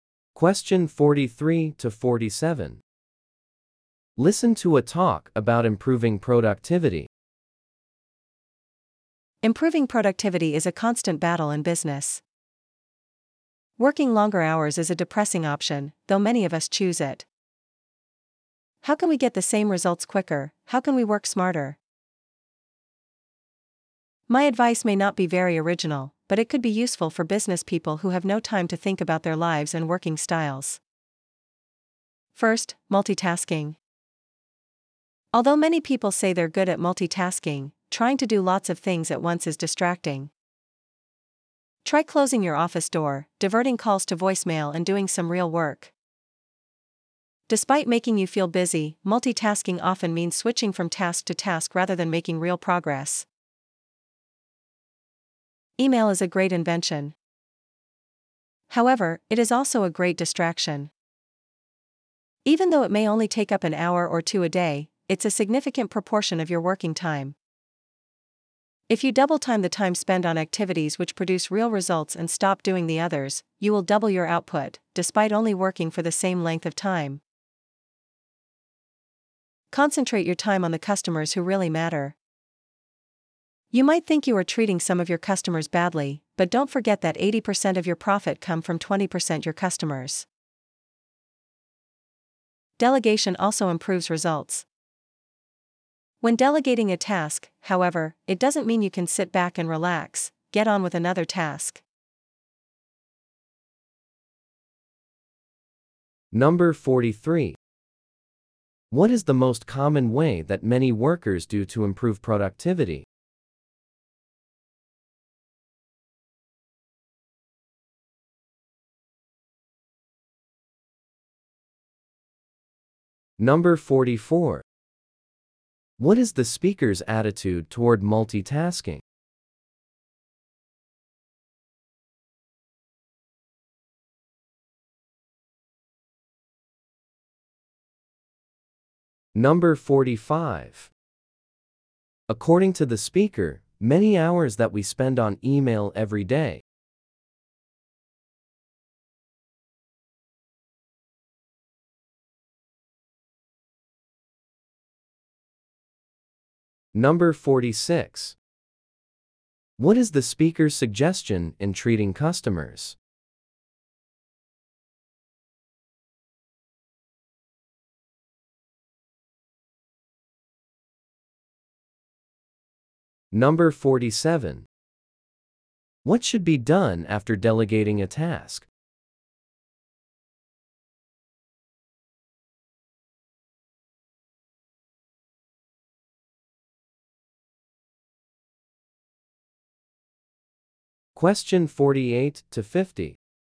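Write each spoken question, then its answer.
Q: What is the most common way that many workers do to improve productivity?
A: Working longer hours

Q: What is the speaker's attitude toward multitasking?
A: Negative; it is distracting

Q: What is the speaker's suggestion in treating customers?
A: Concentrate time on the customers who really matter

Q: What should be done after delegating a task?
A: Get on with another task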